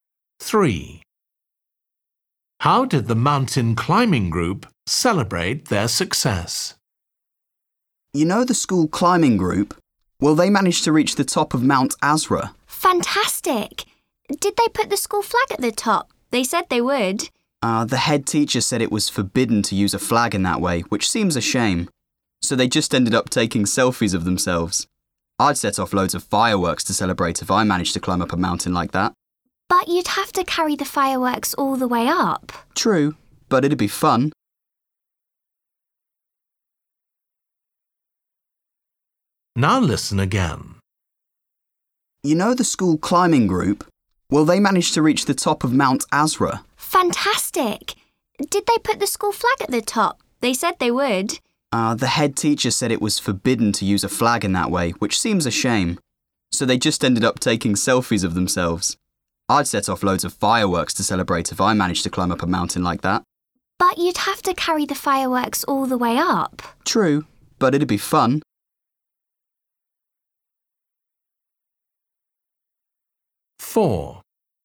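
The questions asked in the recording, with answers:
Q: How did the mountain climbing group celebrate their success?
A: They took selfies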